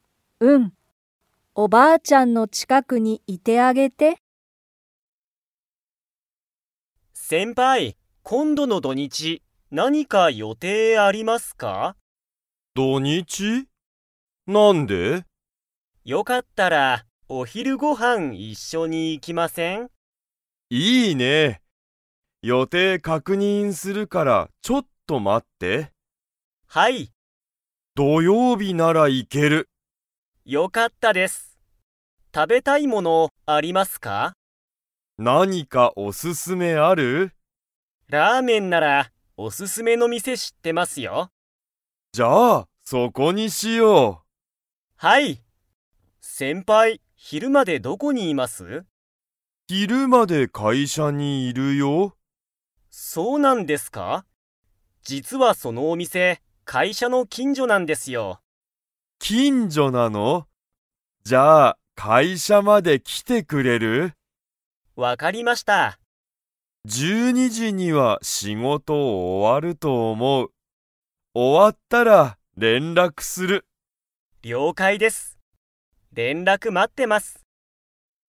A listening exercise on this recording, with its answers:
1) トモヤは、土曜日どようびにお昼ひるご飯はんを食たべに 。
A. 行いける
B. 行いけない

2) トモヤは、昼ひるまでどこにいますか?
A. 家いえ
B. 病院びょういん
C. 近所きんじょ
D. 会社かいしゃ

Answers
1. A. 行いける
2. D. 会社かいしゃ

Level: Level 4

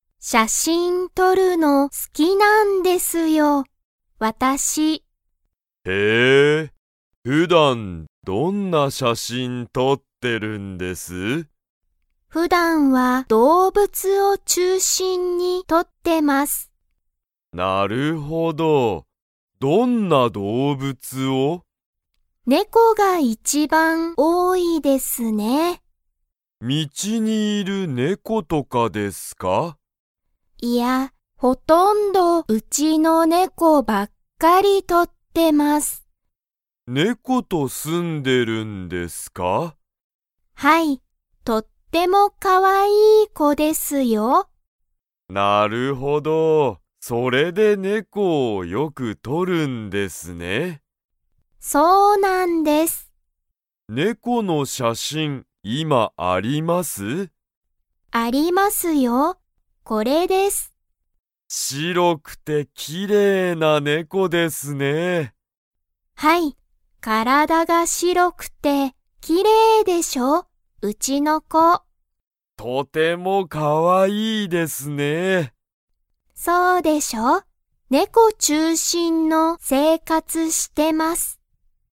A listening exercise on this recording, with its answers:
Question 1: 杉田すぎたさんは、何なんの写真しゃしんをよく撮とりますか?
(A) 動物どうぶつ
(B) 自然しぜん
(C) 道みち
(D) 家いえ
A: (A) 動物どうぶつ

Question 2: 杉田すぎたさんの猫ねこは、体からだが 。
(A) 白しろい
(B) 白しろくない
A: (A) 白しろい

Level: Level 3

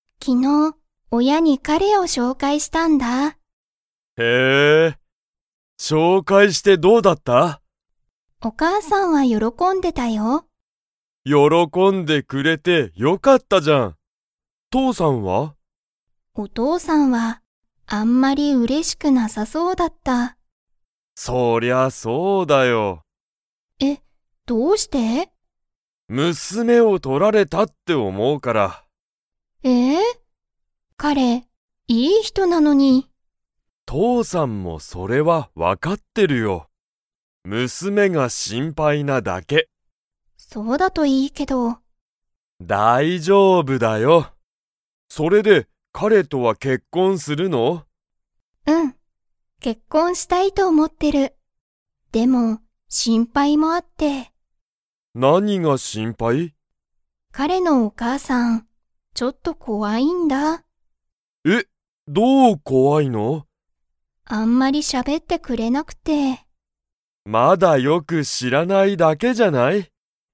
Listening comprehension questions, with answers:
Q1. 彼かれを紹介しょうかいして、誰だれが喜よろこびましたか?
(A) お母かあさん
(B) お父とうさん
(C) ケント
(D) アミの彼かれ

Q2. 彼かれのお母かあさんは、アミと 。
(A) たくさん喋しゃべってくれる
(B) あんまり喋しゃべってくれない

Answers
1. (A) お母かあさん
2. (B) あんまり喋しゃべってくれない

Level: Level 3

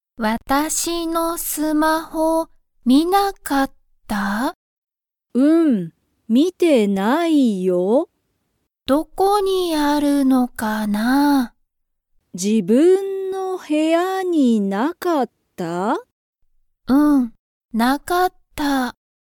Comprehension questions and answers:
サヤのスマホは、部屋(へや)にありましたか?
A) はい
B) いいえ))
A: B) いいえ))

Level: Level 1

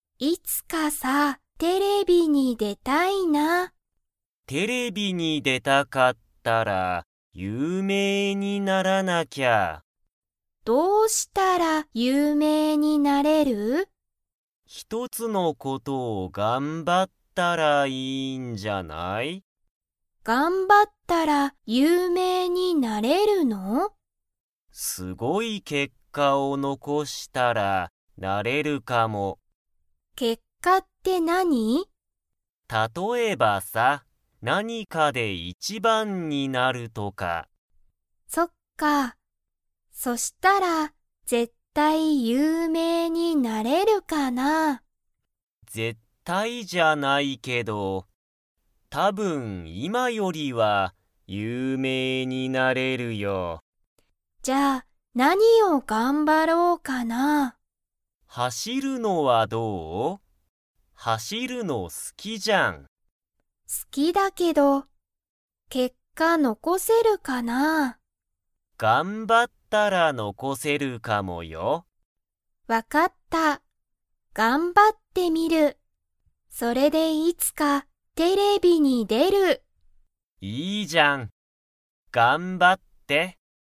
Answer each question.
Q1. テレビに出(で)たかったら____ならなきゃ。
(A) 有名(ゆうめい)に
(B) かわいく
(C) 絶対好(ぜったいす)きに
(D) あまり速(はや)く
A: (A) 有名(ゆうめい)に

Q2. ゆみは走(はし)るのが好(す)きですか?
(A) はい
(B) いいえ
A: (A) はい

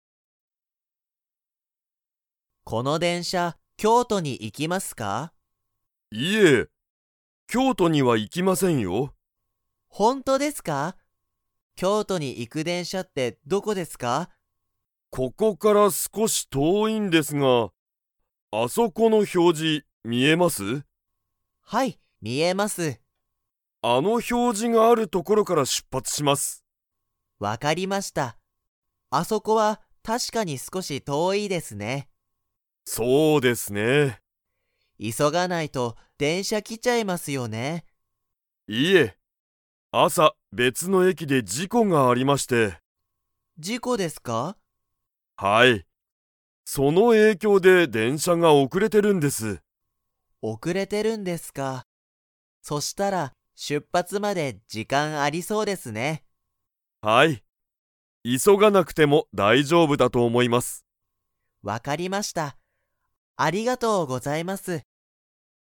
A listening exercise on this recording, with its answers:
Comprehension Quiz (Skip if you don't understand the conversation yet)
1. 京都きょうとに行いく電車でんしゃはここから 。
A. 少すこし遠とおい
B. 全然ぜんぜん遠とおくない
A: A. 少すこし遠とおい

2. 朝あさ、別べつの駅えきで何なにがありましたか?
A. お花見はなみ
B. 事故じこ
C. 表示ひょうじ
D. 映画えいが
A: B. 事故じこ

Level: Level 4

